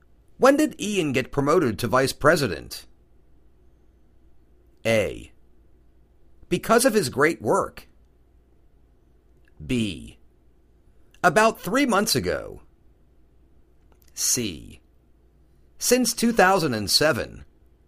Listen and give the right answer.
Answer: About three months ago.